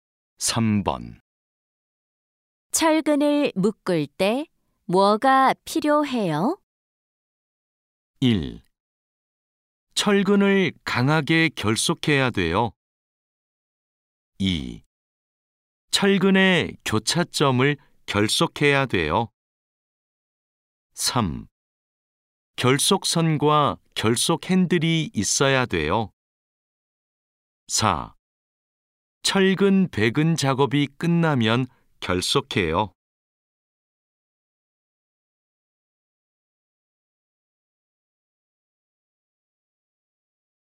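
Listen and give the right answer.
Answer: 3: 결속선과 결속 핸들이 있어야 돼요.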